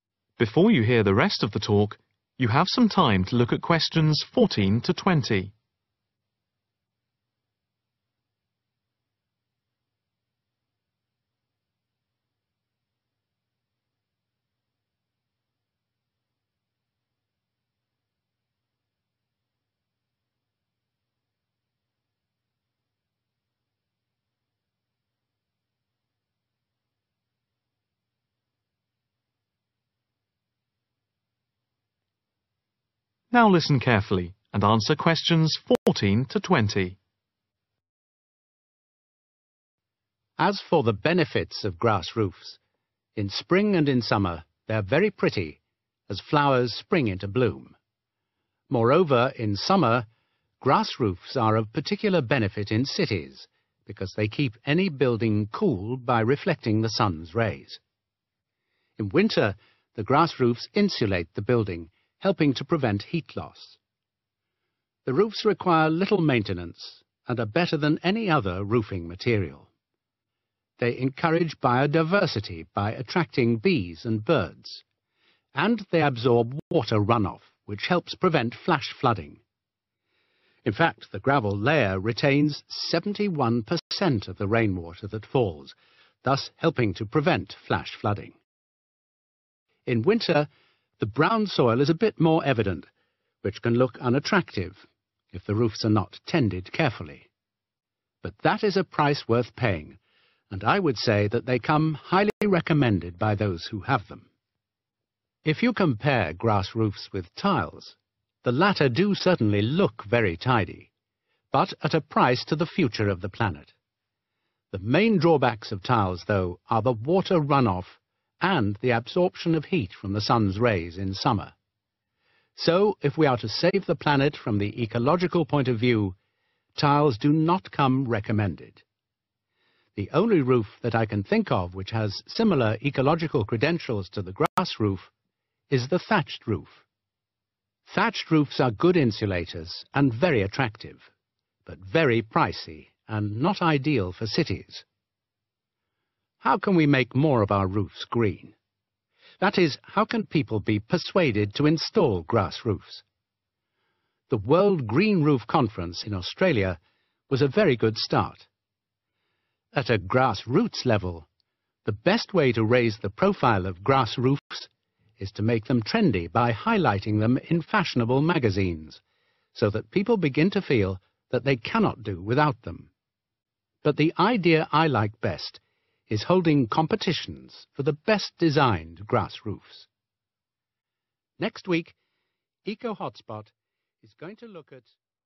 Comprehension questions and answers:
Complete the notes below. Write ONE WORD ONLY for each answer.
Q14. Little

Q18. Very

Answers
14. maintenance
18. expensive